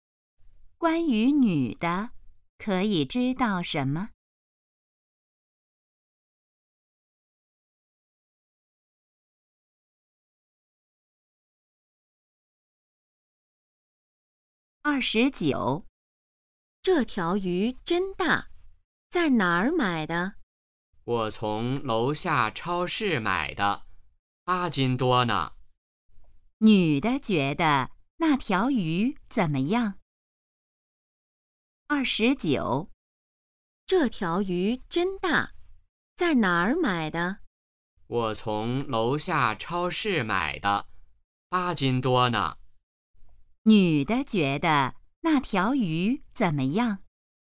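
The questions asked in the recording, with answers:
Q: 女的觉得那条鱼怎么样?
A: 很大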